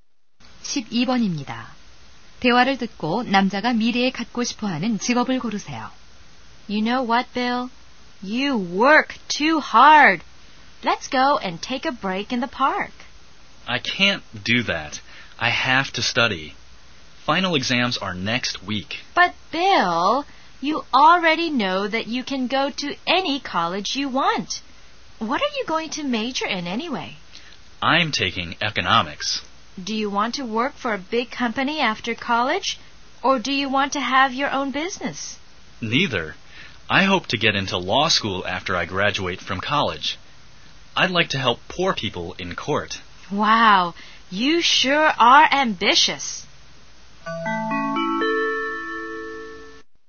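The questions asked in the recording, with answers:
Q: 대화를 듣고 남자가 미래에 갖고 싶어하는 직업을 고르세요.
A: 변호사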